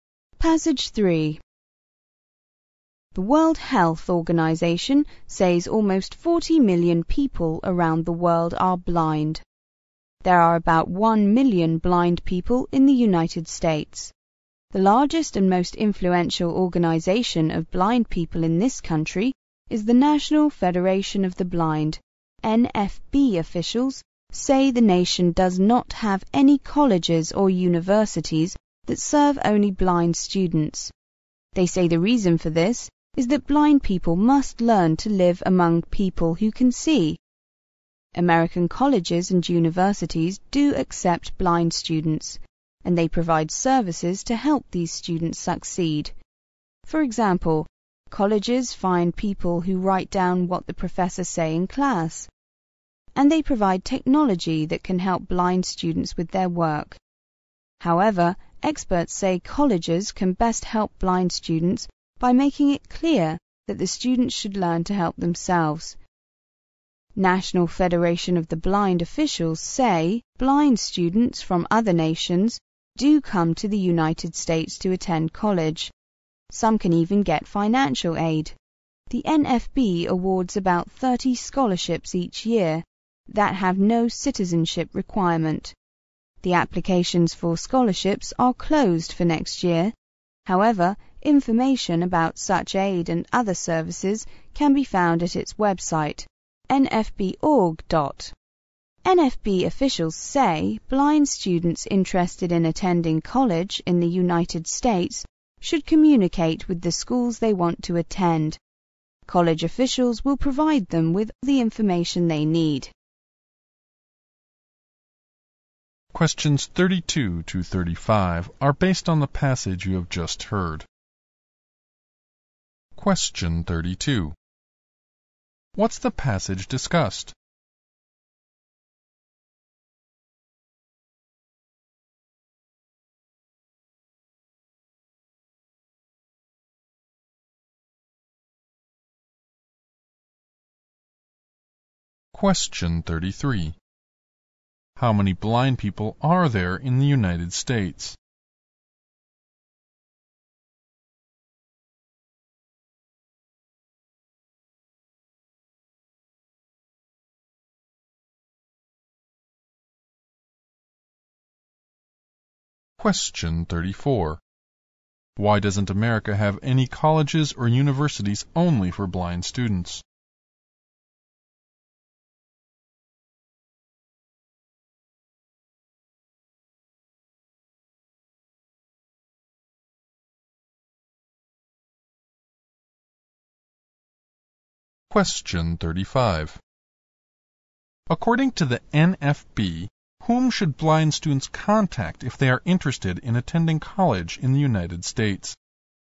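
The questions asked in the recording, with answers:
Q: What's the passage discussed?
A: Blind students attending college in the United States

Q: How many blind people are there in the United States?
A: About 1 million

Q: Why doesn't America have any colleges or universities only for blind students?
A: Blind people must learn to live among people who can see

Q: According to the NFB, whom should blind students contact if they are interested in attending college in the United States?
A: The schools they want to attend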